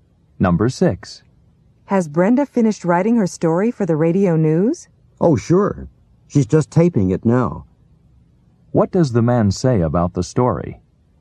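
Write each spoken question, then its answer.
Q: What does the man say about the story?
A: Brenda is taping it now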